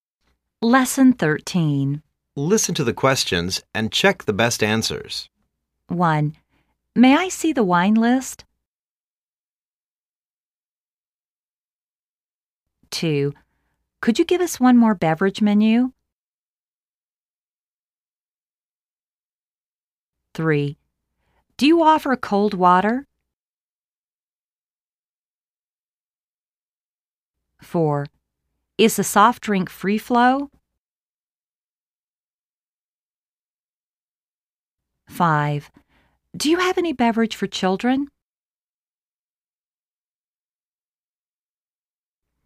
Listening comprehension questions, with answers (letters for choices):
Listen to the questions and check the best answers.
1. May I see the wine list?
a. We don't see the wine list.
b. Yes, there you go.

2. Could you give us one more beverage menu?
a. Yes, this is your beverage.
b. Yes, here is the menu.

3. Do you offer cold water?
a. Yes, it's over there?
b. Yes, our water is cold.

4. Is the soft drink free flow?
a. Yes, the soft drink is free.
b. Yes, you can have as much as you want.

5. Do you have any beverage for children?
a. No,I'm afraid we don't.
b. No,I'm afraid we can't.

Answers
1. b
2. b
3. a
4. b
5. a